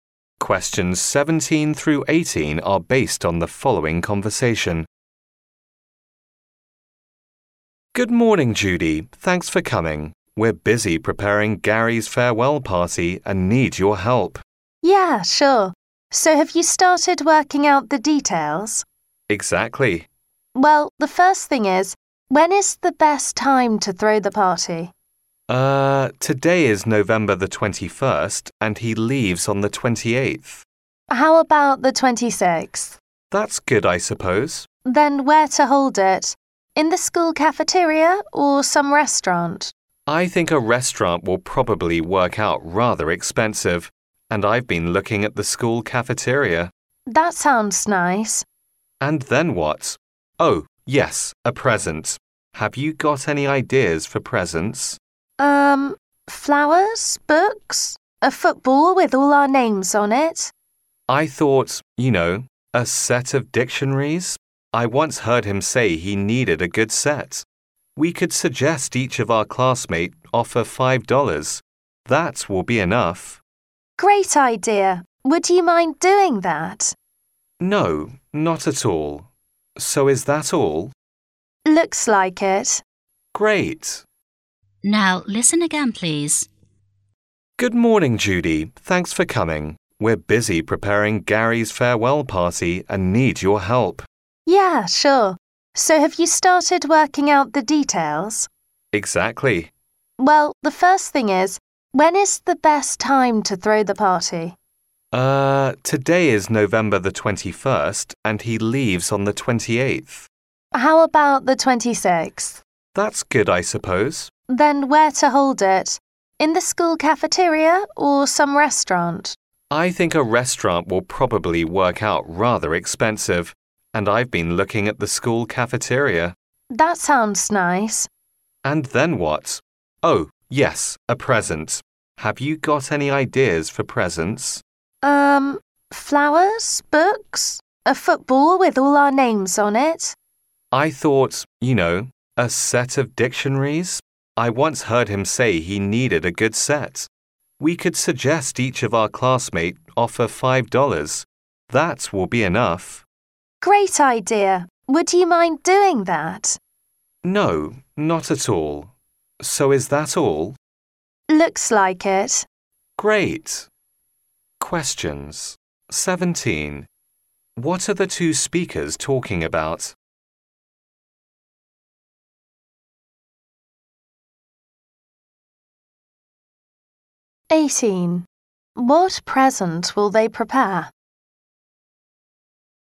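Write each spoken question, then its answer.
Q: What are the two speakers talking about?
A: Preparing Gary's farewell party

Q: What present will they prepare?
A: A set of dictionaries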